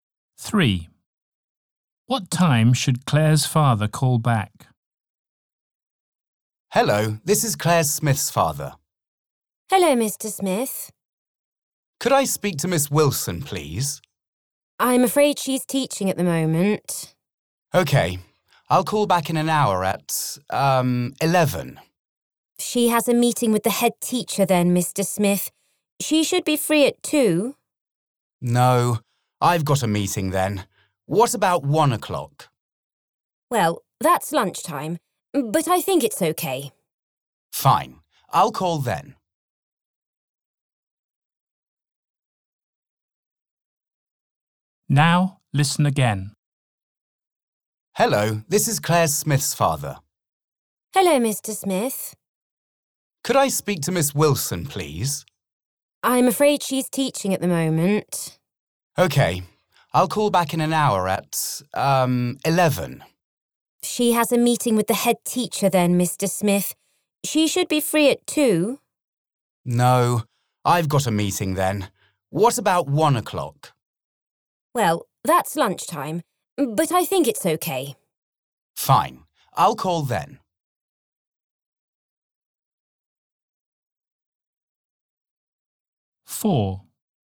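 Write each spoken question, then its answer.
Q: What time should Claire's father call back?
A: 1 o'clock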